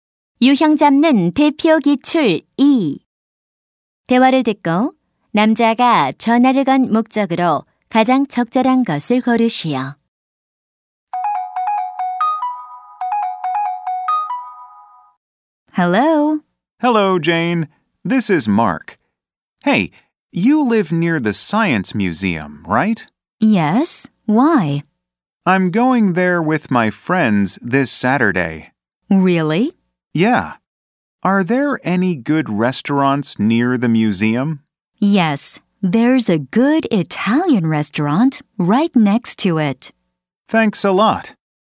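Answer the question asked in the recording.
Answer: 과학관 근처 식당을 물어보려고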